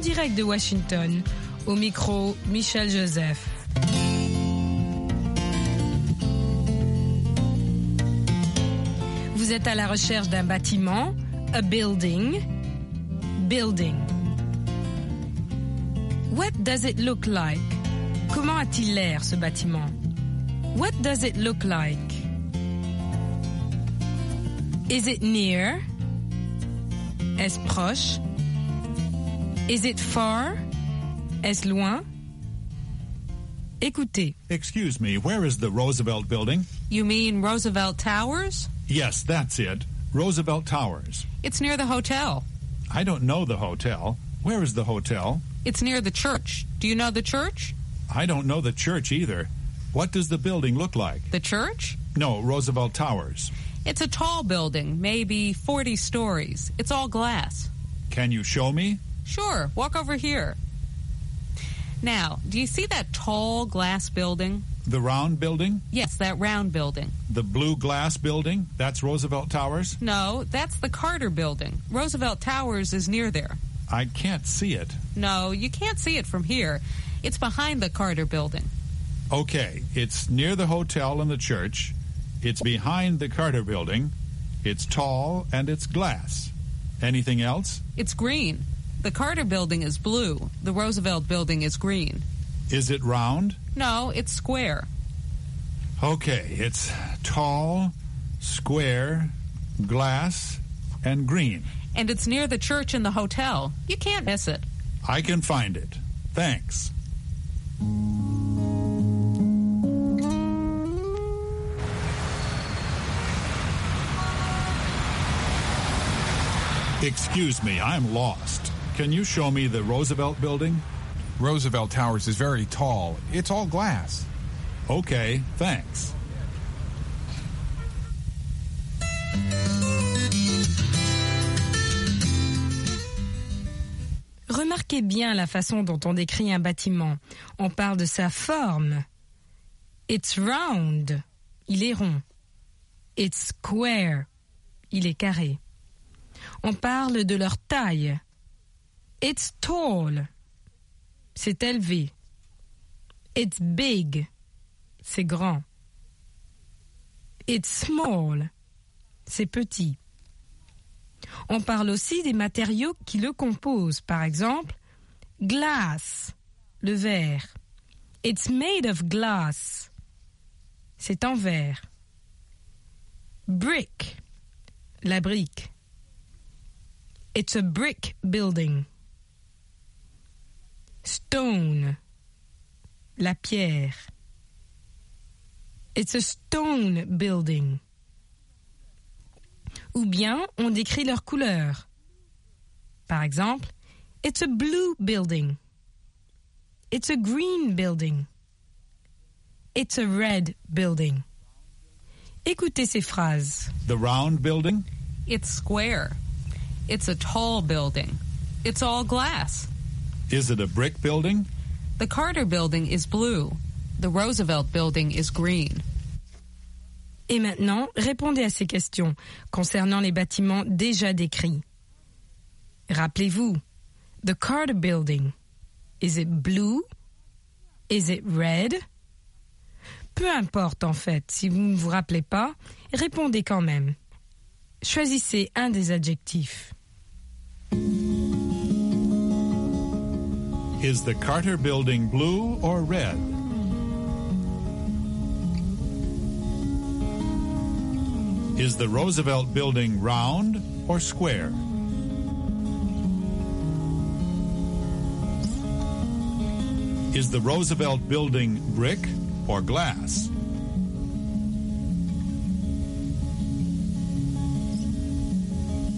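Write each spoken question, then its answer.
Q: Is the Carter Building blue or red?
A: Blue

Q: Is the Roosevelt Building round or square?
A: Square

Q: Is the Roosevelt Building brick or glass?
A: Glass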